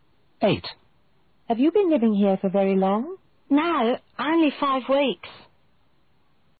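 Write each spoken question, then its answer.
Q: Have you been living here for very long?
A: 5 weeks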